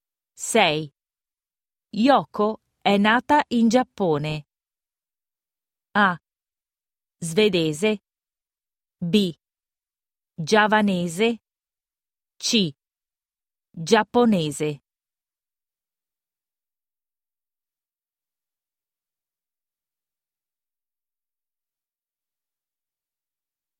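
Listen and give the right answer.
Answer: C: Giapponese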